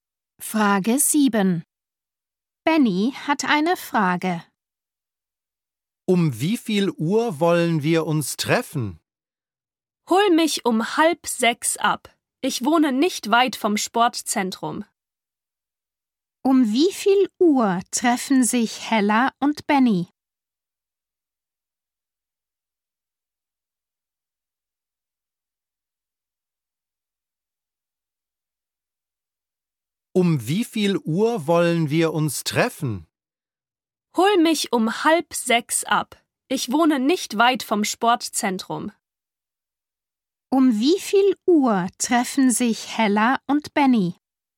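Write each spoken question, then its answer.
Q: Um wie viel Uhr treffen sich Hella und Benny?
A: Um 5:30 (halb sechs)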